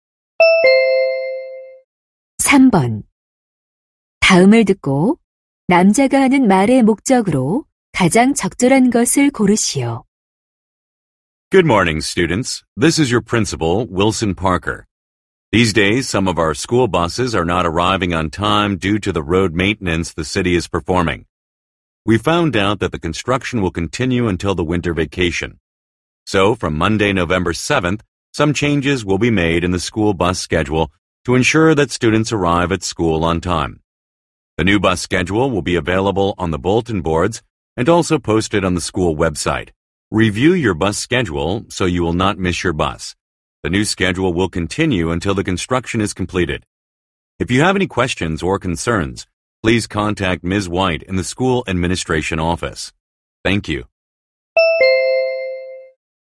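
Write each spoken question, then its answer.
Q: 다음을 듣고 남자가 하는 말의 목적으로 가장 적절한 것을 고르시오.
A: 도로 공사로 인한 스쿨버스 시간표 변경을 안내하려고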